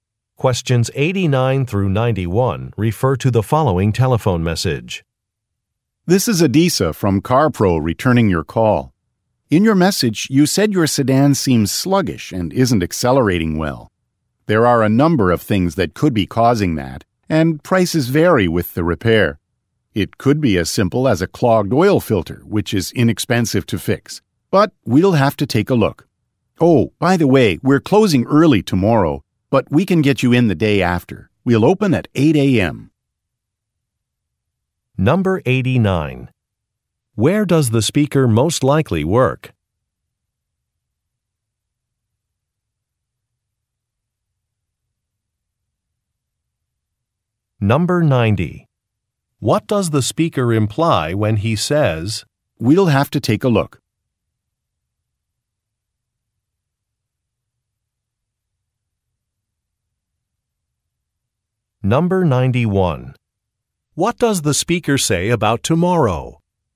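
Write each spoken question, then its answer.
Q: Where does the speaker most likely work?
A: At a car repair shop

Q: What does the speaker say about tomorrow?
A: The business is closing early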